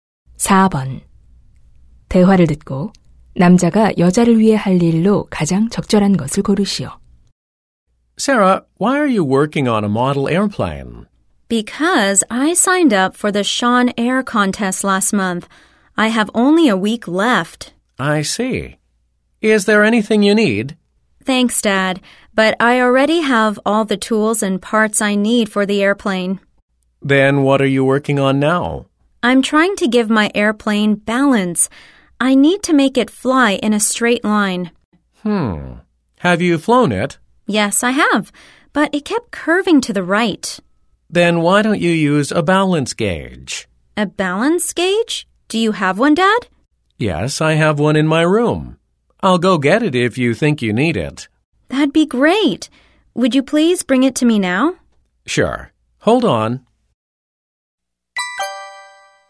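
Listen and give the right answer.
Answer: 균형 측정기 가져다주기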